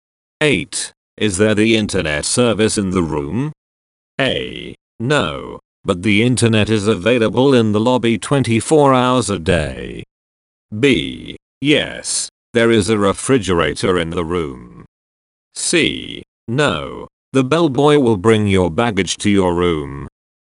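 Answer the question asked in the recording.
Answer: A: No, but the internet is available in the lobby 24 hours a day.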